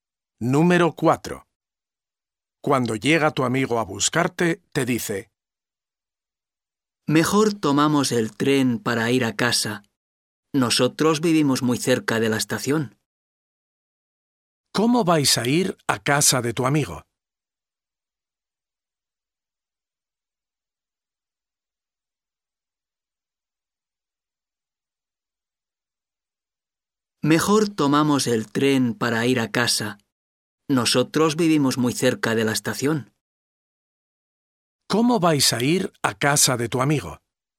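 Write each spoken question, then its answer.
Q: ¿Cómo vais a ir a casa de tu amigo?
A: En tren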